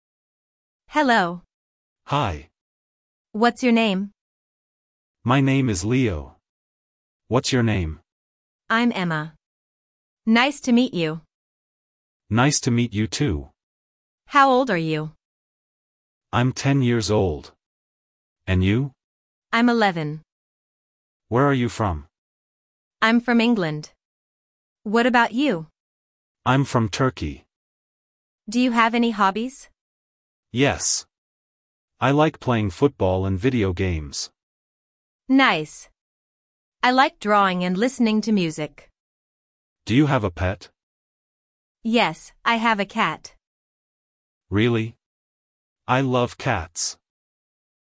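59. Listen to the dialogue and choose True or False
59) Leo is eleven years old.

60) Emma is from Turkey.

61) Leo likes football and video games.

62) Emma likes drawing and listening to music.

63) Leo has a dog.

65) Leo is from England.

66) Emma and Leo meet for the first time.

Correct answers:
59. False
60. True
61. True
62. True
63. False
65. True
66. True

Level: LEVEL A1/A2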